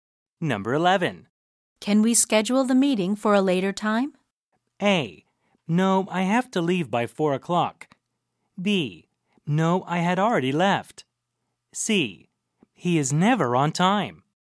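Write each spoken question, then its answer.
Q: Can we schedule the meeting for a later time?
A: A: No, I have to leave by 4 o'clock.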